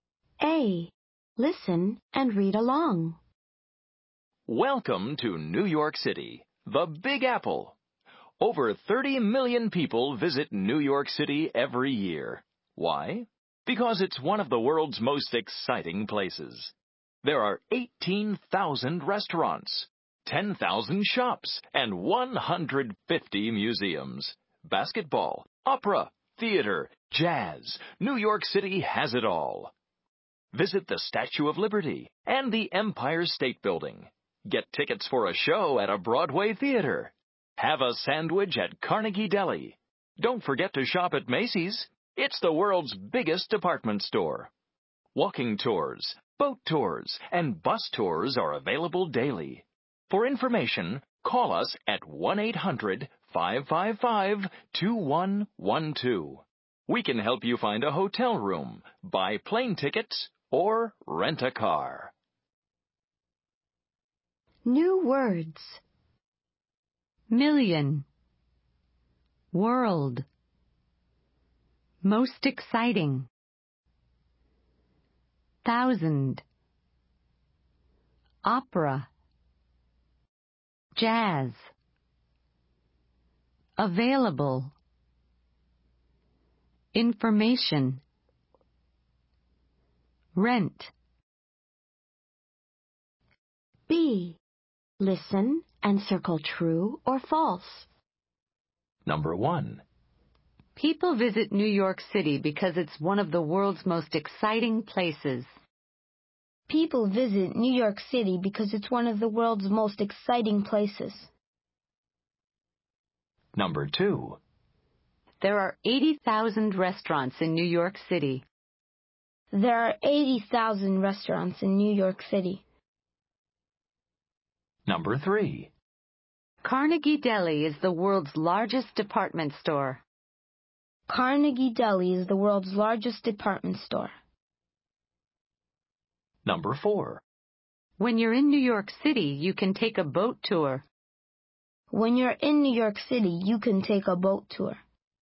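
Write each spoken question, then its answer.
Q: People visit New York City because it's one of the world's most exciting places.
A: True

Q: There are 80,000 restaurants in New York City.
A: False

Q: Carnegie Deli is the world's largest department store.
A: False

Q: When you're in New York City, you can take a boat tour.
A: True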